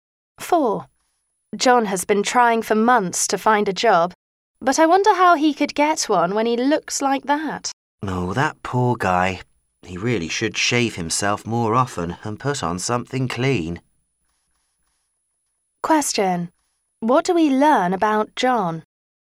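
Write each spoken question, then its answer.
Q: What do we learn about John?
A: He looks untidy and hasn't found a job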